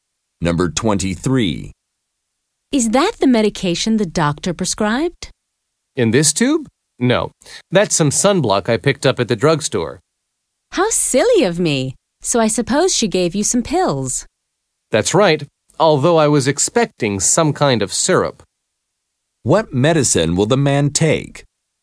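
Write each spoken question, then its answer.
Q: What medicine will the man take?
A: Pills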